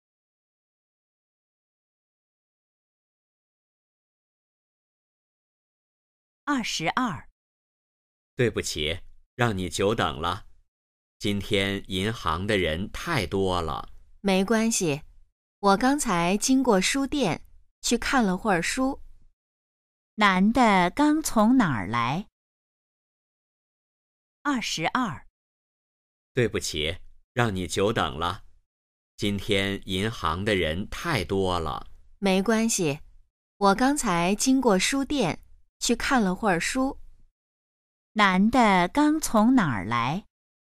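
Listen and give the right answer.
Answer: 书店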